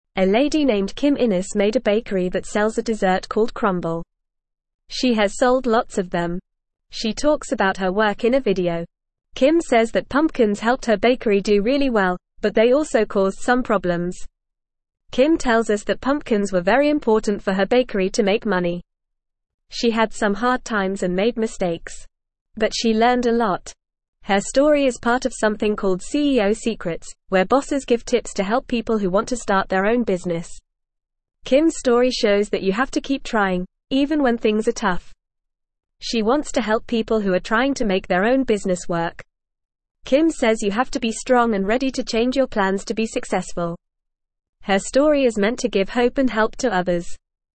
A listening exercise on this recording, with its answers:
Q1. She has sold (1)______ of them.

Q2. She talks about her (2)______ in a video.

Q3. Kim says that (3)______ helped her bakery do really well, but they also caused some problems.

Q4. Kim tells us that pumpkins were very important for her (4)______ to make money.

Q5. She had some (5)______ times and made (6)______.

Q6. She had some (5)______ times and made (6)______.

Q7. Her story is part of something called CEO Secrets, where bosses give tips to help people who want to start their own (7)______.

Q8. Kim's story (8)______ that you have to keep trying, even when things are (9)______.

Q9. Kim's story (8)______ that you have to keep trying, even when things are (9)______.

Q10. She wants to (10)______ people who are trying to make their own business work.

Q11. Kim says you have to be strong and ready to (11)______ your plans to be successful.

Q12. Her story is meant to (12)______ hope and help to others.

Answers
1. lots
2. work
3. pumpkins
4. bakery
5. hard
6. mistakes
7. business
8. shows
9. tough
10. help
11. change
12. give

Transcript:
A lady named Kim Innes made a bakery that sells a dessert called crumble. She has sold lots of them. She talks about her work in a video. Kim says that pumpkins helped her bakery do really well, but they also caused some problems.
Kim tells us that pumpkins were very important for her bakery to make money. She had some hard times and made mistakes. But she learned a lot. Her story is part of something called CEO Secrets, where bosses give tips to help people who want to start their own business.
Kim's story shows that you have to keep trying, even when things are tough. She wants to help people who are trying to make their own business work. Kim says you have to be strong and ready to change your plans to be successful. Her story is meant to give hope and help to others.

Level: Level 2